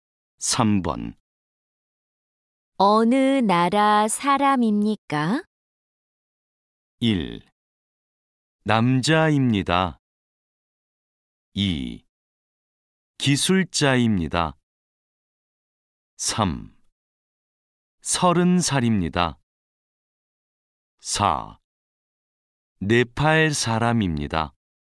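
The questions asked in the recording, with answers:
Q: 어느 나라 사람입니까?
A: 4: 네팔 사람입니다.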